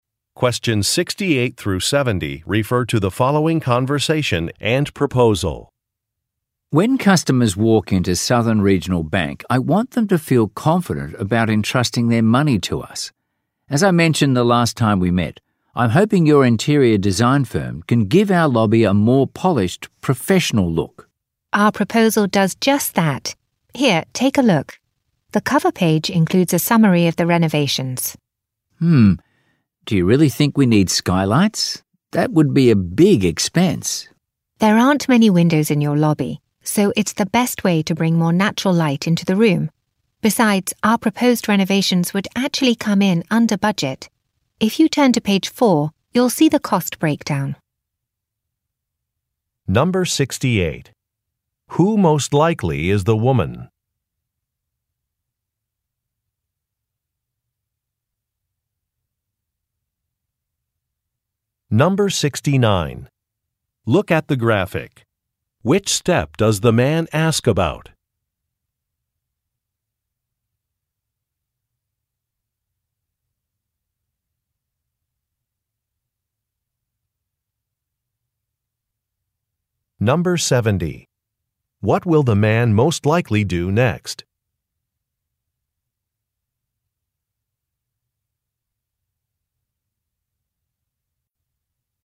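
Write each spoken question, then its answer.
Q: What will the man most likely do next?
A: Review the cost breakdown on page 4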